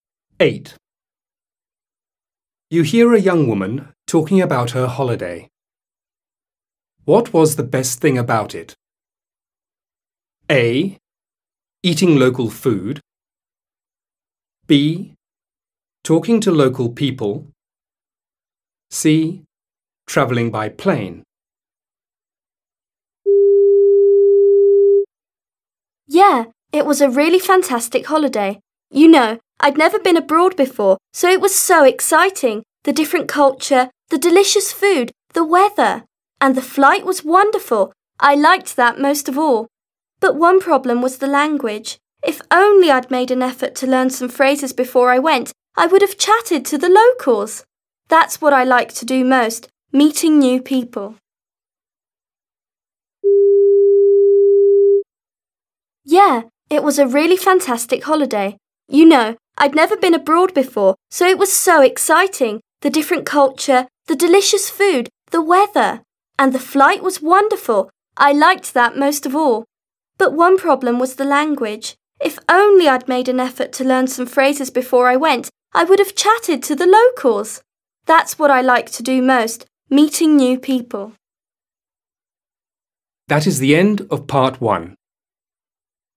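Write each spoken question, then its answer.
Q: What was the best thing about it?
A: C: Traveling by plane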